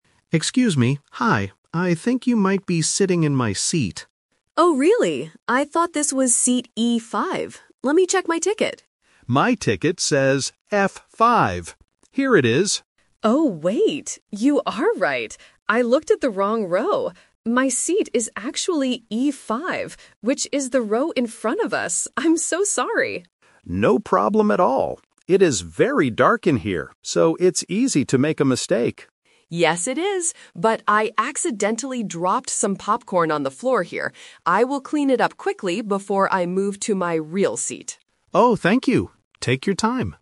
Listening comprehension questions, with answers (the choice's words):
Listen to the conversation and choose the correct answer (A, B, or C) for each question.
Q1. What is the man's seat number?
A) E5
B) F5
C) G5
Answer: F5

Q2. Why did the woman sit in the wrong place?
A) She looked at the wrong row.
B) She lost her movie ticket.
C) She wanted to sit in the back.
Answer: She looked at the wrong row.

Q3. What will the woman do before she moves to her correct seat?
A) Buy some more popcorn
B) Clean up the floor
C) Turn on the lights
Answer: Clean up the floor

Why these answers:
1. The man explicitly says, "My ticket says F5." Option A (E5) is the trap because it is the woman's actual seat number. Option C is not mentioned.
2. The woman realizes her mistake and says, "I looked at the wrong row." Option B is the trap because she says "Let me check my ticket," meaning she didn't lose it. Option C is not mentioned.
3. The woman says she dropped popcorn and promises, "I will clean it up quickly before I move." Option C is the trap because the man mentions it is "very dark," but no one turns on the lights. Option A is not mentioned.

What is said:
Man: Excuse me, hi. I think you might be sitting in my seat.
Woman: Oh, really? I thought this was seat E5. Let me check my ticket.
Man: My ticket says F5. Here it is.
Woman: Oh, wait. You are right. I looked at the wrong row. My seat is actually E5, which is the row in front of us. I'm so sorry.
Man: No problem at all. It is very dark in here, so it's easy to make a mistake.
Woman: Yes, it is. But I accidentally dropped some popcorn on the floor here. I will clean it up quickly before I move to my real seat.